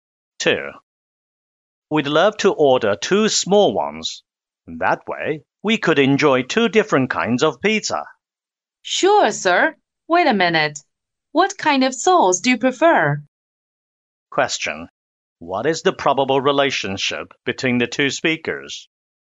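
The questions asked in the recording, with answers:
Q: What is the probable relationship between the two speakers?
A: Waiter and customer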